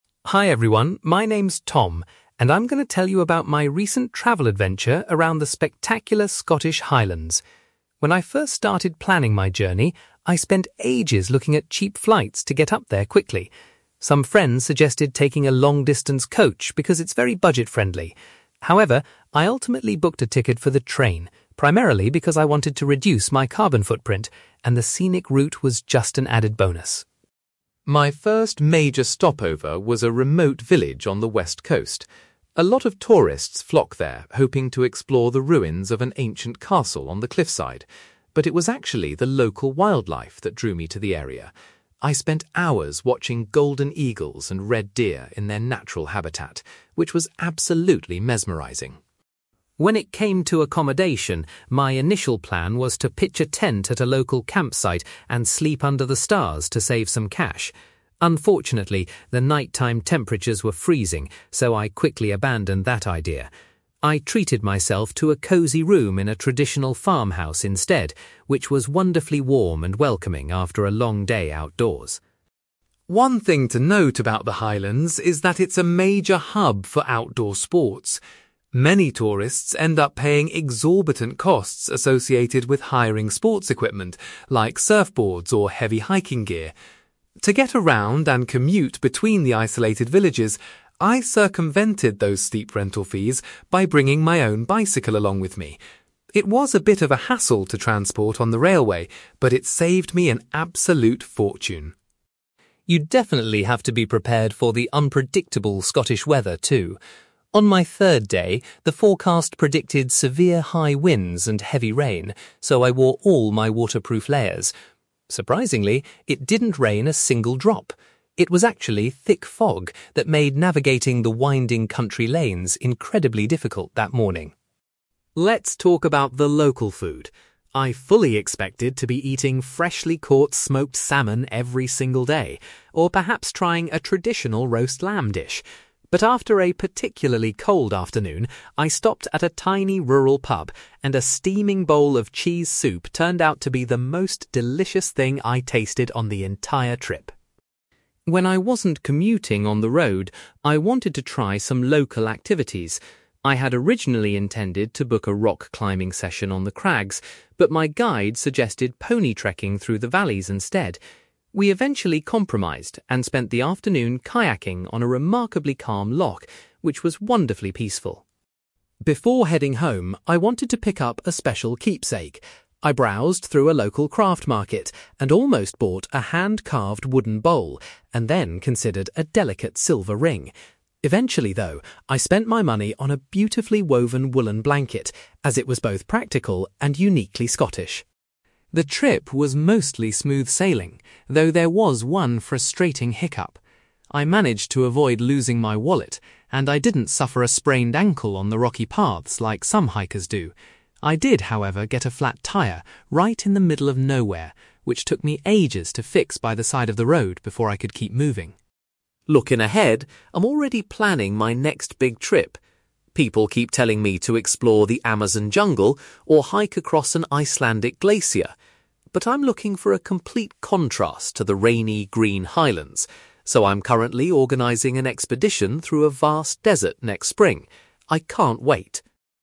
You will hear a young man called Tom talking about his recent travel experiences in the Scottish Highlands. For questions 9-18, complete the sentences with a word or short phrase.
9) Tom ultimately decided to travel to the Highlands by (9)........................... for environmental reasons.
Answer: train

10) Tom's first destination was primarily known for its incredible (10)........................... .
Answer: wildlife

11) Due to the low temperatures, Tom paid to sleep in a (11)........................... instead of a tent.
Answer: farmhouse

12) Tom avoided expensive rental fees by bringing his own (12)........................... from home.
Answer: bicycle

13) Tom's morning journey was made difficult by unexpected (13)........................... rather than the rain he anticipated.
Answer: thick fog

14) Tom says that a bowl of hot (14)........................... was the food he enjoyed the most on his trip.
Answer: cheese soup

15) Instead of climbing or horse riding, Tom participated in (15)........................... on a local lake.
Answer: kayaking

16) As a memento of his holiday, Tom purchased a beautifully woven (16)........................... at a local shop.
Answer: woollen blanket

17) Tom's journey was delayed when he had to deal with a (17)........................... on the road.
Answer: flat tyre

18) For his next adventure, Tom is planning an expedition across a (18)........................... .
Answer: desert

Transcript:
Tom: Hi everyone, my name is Tom, and I'm going to tell you about my recent travel adventure around the spectacular Scottish Highlands. When I first started planning my journey, I spent ages looking at cheap flights to get up there quickly. Some friends suggested taking a long-distance coach because it's very budget-friendly. However, I ultimately booked a ticket for the train, primarily because I wanted to reduce my carbon footprint, and the scenic route was just an added bonus.
My first major stopover was a remote village on the west coast. A lot of tourists flock there hoping to explore the ruins of an ancient castle on the cliffside, but it was actually the local wildlife that drew me to the area. I spent hours watching golden eagles and red deer in their natural habitat, which was absolutely mesmerising.
When it came to accommodation, my initial plan was to pitch a tent at a local campsite and sleep under the stars to save some cash. Unfortunately, the night-time temperatures were freezing, so I quickly abandoned that idea. I treated myself to a cosy room in a traditional farmhouse instead, which was wonderfully warm and welcoming after a long day outdoors.
One thing to note about the Highlands is that it's a major hub for outdoor sports. Many tourists end up paying exorbitant costs associated with hiring sports equipment, like surfboards or heavy hiking gear. To get around and commute between the isolated villages, I circumvented those steep rental fees by bringing my own bicycle along with me. It was a bit of a hassle to transport on the railway, but it saved me an absolute fortune.
You definitely have to be prepared for the unpredictable Scottish weather, too. On my third day, the forecast predicted severe high winds and heavy rain, so I wore all my waterproof layers. Surprisingly, it didn't rain a single drop; it was actually thick fog that made navigating the winding country lanes incredibly difficult that morning.
Let's talk about the local food. I fully expected to be eating freshly caught smoked salmon every single day, or perhaps trying a traditional roast lamb dish. But after a particularly cold afternoon, I stopped at a tiny rural pub, and a steaming bowl of cheese soup turned out to be the most delicious thing I tasted on the entire trip.
When I wasn't commuting on the road, I wanted to try some local activities. I had originally intended to book a rock climbing session on the crags, but my guide suggested pony trekking through the valleys instead. We eventually compromised and spent the afternoon kayaking on a remarkably calm loch, which was wonderfully peaceful.
Before heading home, I wanted to pick up a special keepsake. I browsed through a local craft market and almost bought a hand-carved wooden bowl, and then considered a delicate silver ring. Eventually, though, I spent my money on a beautifully woven woollen blanket, as it was both practical and uniquely Scottish.
The trip was mostly smooth sailing, though there was one frustrating hiccup. I managed to avoid losing my wallet, and I didn't suffer a sprained ankle on the rocky paths like some hikers do. I did, however, get a flat tyre right in the middle of nowhere, which took me ages to fix by the side of the road before I could keep moving.
Looking ahead, I'm already planning my next big trip. People keep telling me to explore the Amazon jungle or hike across an Icelandic glacier. But I'm looking for a complete contrast to the rainy, green Highlands, so I'm currently organising an expedition through a vast desert next spring. I can't wait!

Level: B2